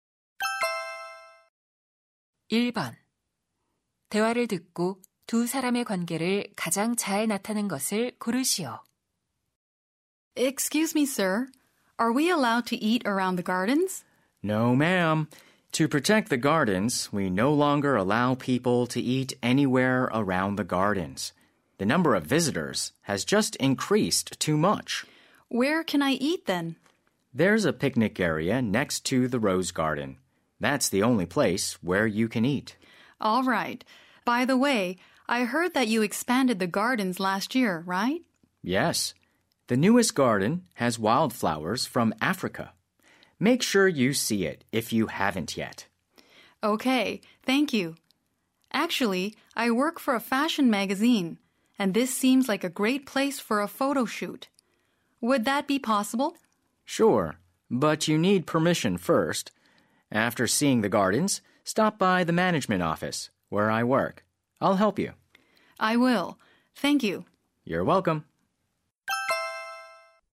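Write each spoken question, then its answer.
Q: 대화를 듣고 두 사람의 관계를 가장 잘 나타낸 것을 고르시오.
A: 방문객(잡지사 직원) - 정원 관리 직원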